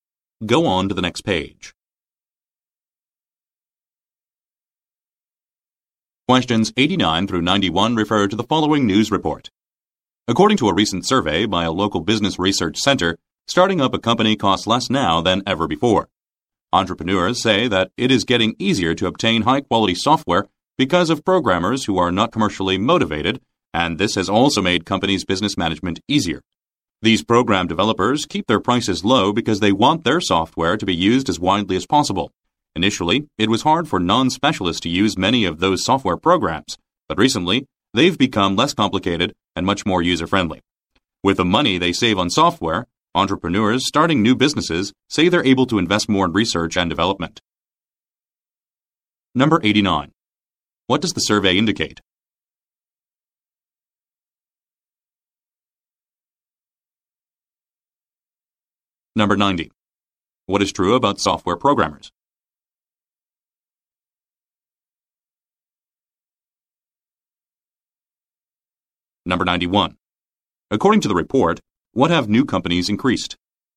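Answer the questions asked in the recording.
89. Starting a company costs less than ever before
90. They keep prices low so their software is widely used
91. Investment in research and development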